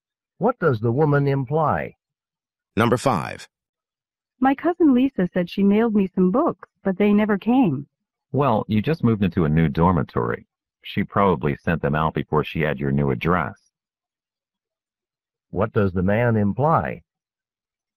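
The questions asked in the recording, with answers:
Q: What does the man imply?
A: The books were probably sent to her old address.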